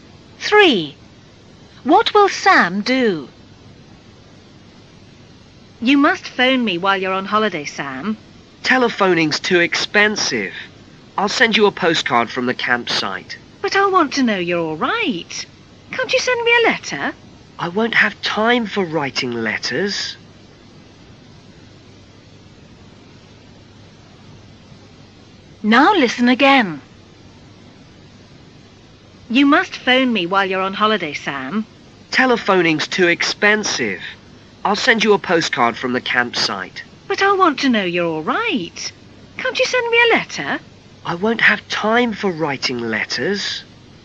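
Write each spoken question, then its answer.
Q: What will Sam do?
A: Send a postcard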